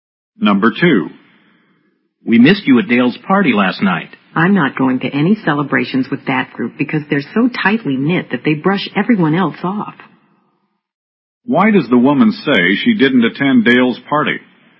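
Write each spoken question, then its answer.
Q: Why does the woman say she didn't attend Dale's party?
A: The group is so tightly knit that they ignore everyone else.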